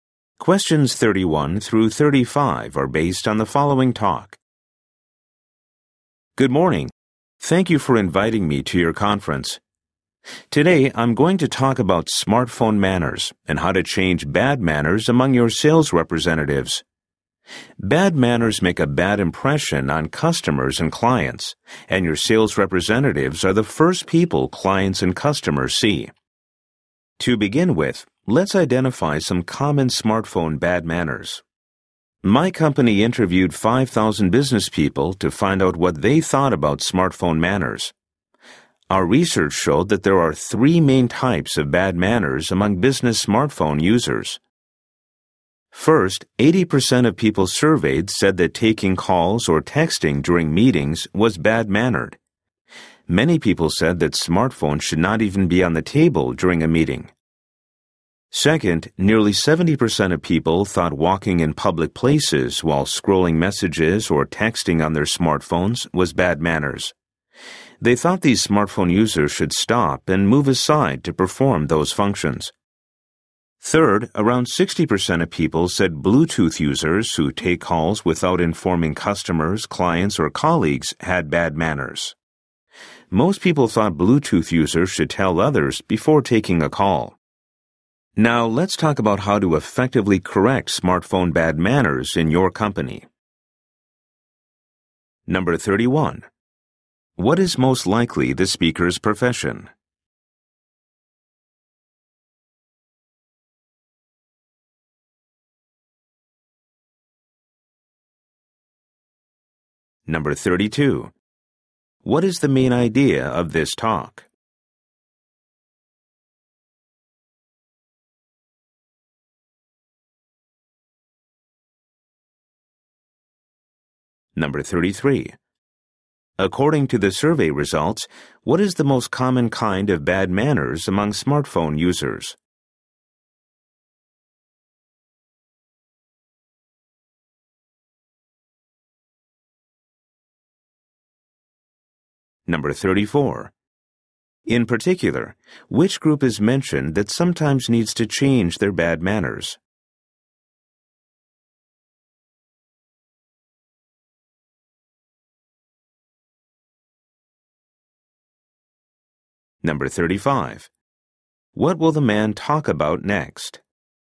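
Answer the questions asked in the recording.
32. Smartphone manners and how to change bad manners among sales representatives.
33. Taking calls or texting during meetings.
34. Sales representatives.
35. How to effectively correct smartphone bad manners in the company.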